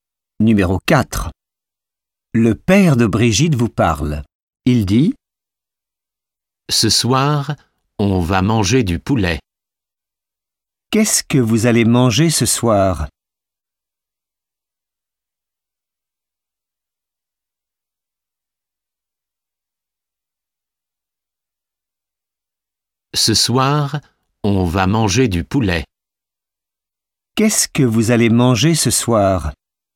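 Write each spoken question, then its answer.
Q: Qu'est-ce que vous allez manger ce soir?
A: Du poulet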